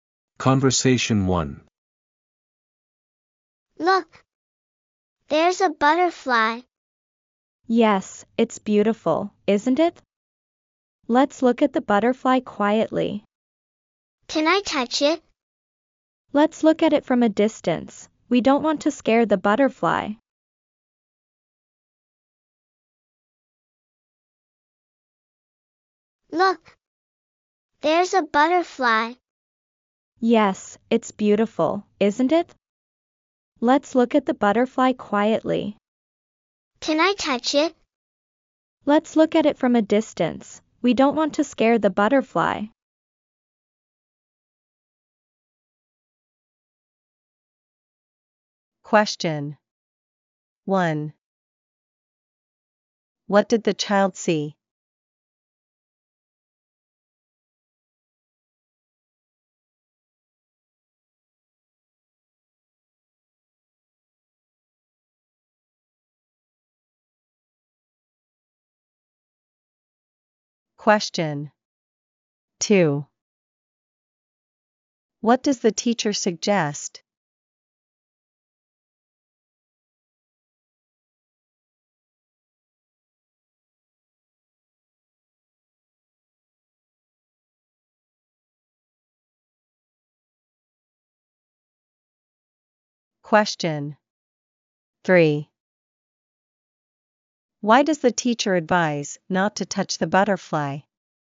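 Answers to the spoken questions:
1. A butterfly
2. To look at the butterfly quietly from a distance
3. They don't want to scare it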